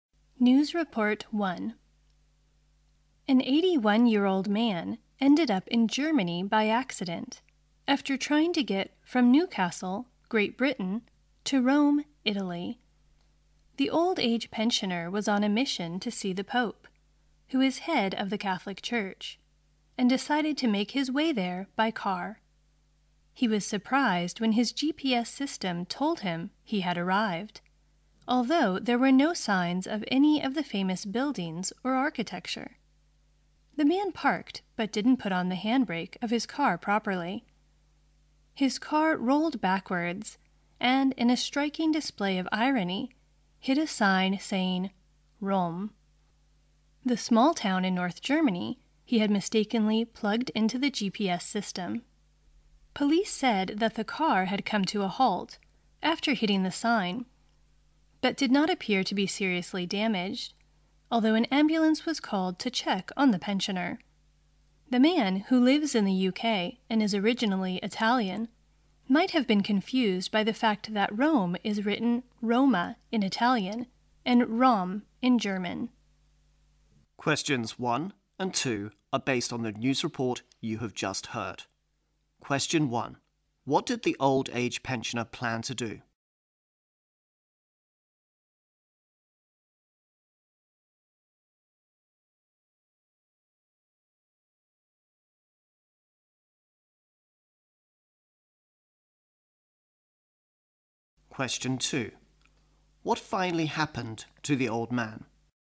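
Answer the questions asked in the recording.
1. Drive to Rome to see the Pope
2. He ended up in Rom, a small town in North Germany, and his car rolled back and hit the Rome sign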